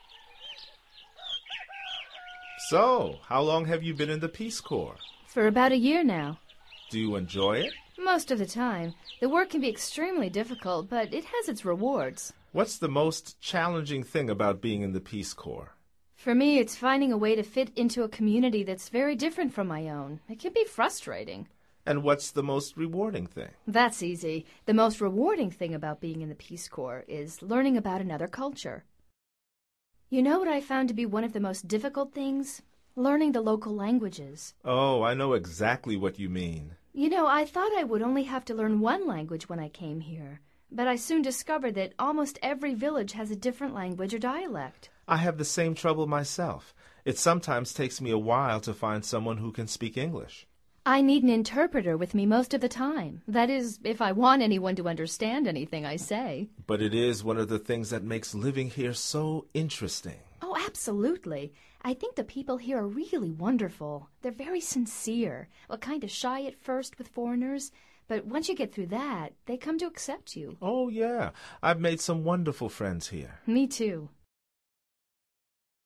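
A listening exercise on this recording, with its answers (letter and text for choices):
Activity 27: Basándote en los comentarios anteriores, selecciona las opciones más adecuadas para cada oración. Verifica luego las respuestas correctas.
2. The most rewarding thing for Liza is ...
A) understanding what people say.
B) finding a way to fit into a community.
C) learning about another culture.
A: C) learning about another culture.

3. What is it troublesome for Matt?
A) To find an interpreter.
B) To find an English speaker.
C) To learn the only dialect.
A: B) To find an English speaker.

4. What are people there like?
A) Not very sincere.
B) Shy at first.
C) Most interesting.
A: B) Shy at first.

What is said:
So, how long have you been in the Peace Corps?
For about a year now.
Do you enjoy it?
Most of the time. The work can be extremely difficult, but it has its rewards.
What's the most challenging thing about being in the Peace Corps?
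For me, it's finding a way to fit into a community that's very different from my own. It can be frustrating!
And what's the most rewarding thing?
That's easy. The most rewarding thing about being in the Peace Corps is learning about another culture. You know what I've found to be one of the most difficult things? Learning the local languages.
Oh, I know exactly what you mean!
You know, I thought I would only have to learn one language when I came here, but I soon discovered that almost every village has a different language or dialect.
I have the same trouble myself. It sometimes takes me a while to find someone who can speak English.
I need an interpreter with me most of the time – that is, if I want anyone to understand anything I say.
But it is one of the things that makes living here so interesting.
Oh, absolutely. I think the people here are really wonderful. They're very sincere – kind of shy at first with foreigners, but once you get through that, they come to accept you.
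Oh, yeah. I've made some wonderful friends here.

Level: Nivel Avanzado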